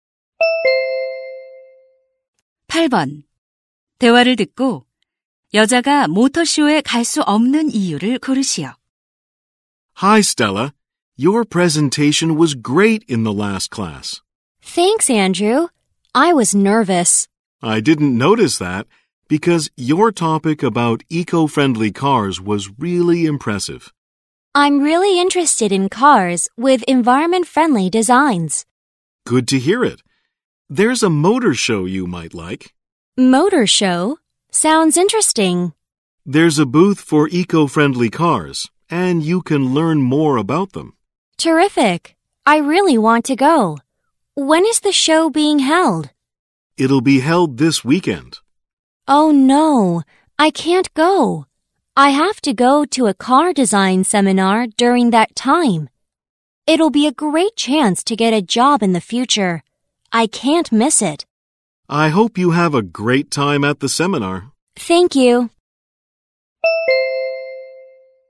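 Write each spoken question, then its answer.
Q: 대화를 듣고 여자가 모터쇼에 갈 수 없는 이유를 고르시오.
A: 자동차 디자인 세미나에 가야 해서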